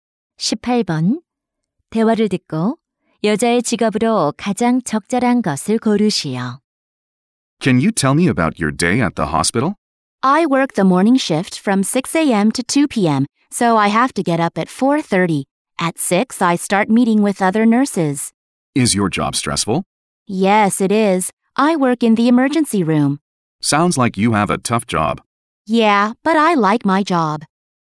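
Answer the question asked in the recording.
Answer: 간호사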